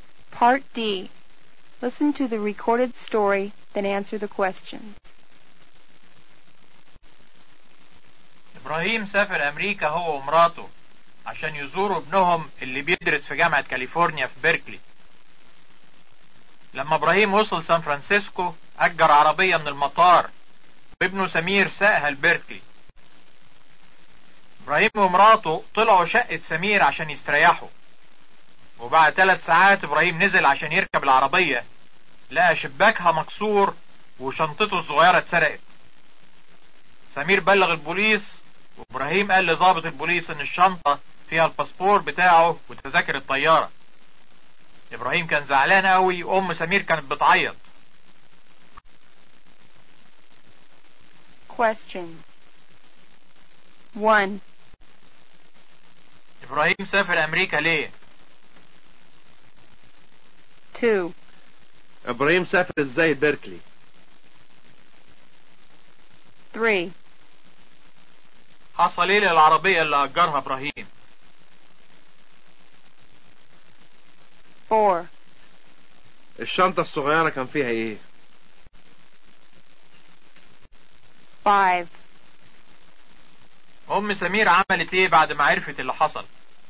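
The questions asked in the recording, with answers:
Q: إبراهيم سافر أمريكا ليه؟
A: عشان يزور ابنه اللي بيدرس في جامعة كاليفورنيا في بيركلي

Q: إبراهيم سافر إزاي بيركلي؟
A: بعربية مأجرة من المطار وابنه سمير ساقها

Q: حصل إيه للعربية اللي أجرها إبراهيم؟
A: شباكها اتكسر وشنطته اتسرقت منها

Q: الشنطة الصغيرة كان فيها ايه؟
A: الباسبور بتاعه وتذاكر الطيارة

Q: ام سمير عملت ايه بعد ما عرفت اللي حصل؟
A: عيطت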